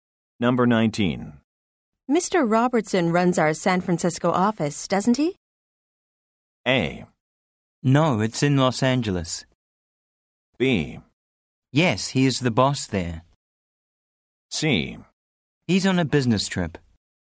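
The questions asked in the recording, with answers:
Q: Mr. Robertson runs our San Francisco office, doesn't he?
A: B: Yes, he is the boss there.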